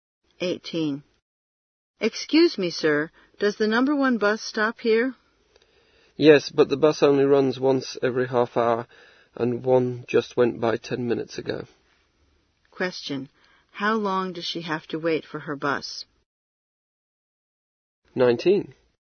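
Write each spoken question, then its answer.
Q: How long does she have to wait for her bus?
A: 20 minutes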